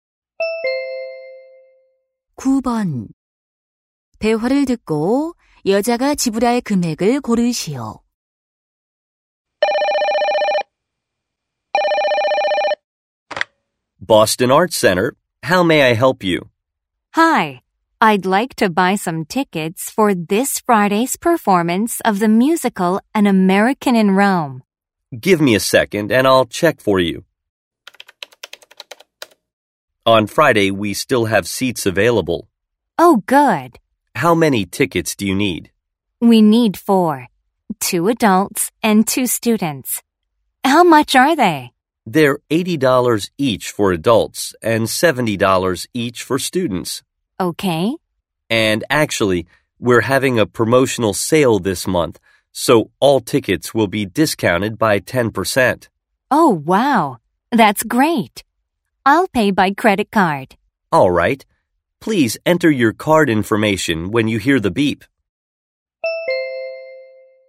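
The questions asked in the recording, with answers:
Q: 대화를 듣고 여자가 지불할 금액을 고르시오.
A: $270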